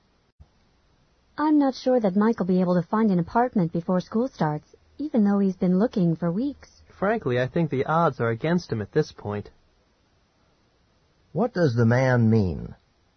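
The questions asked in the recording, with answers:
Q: What does the man mean?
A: Mike probably won't find an apartment before school starts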